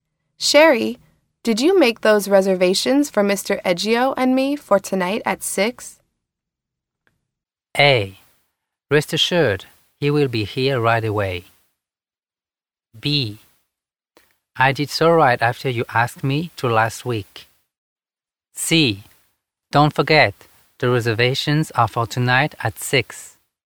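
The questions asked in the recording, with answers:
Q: Sherry, did you make those reservations for Mr. Eggio and me for tonight at 6?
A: B: I did so right after you asked me to last week.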